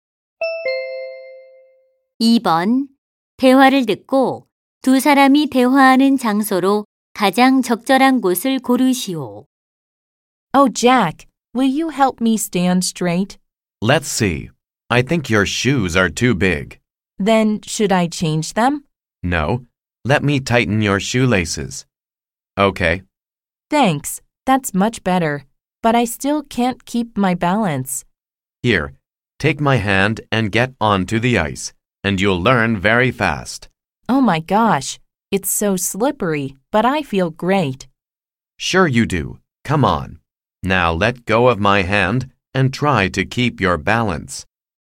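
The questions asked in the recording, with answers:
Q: 대화를 듣고 두 사람이 대화하는 장소로 가장 적절한 곳을 고르시오.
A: 스케이트장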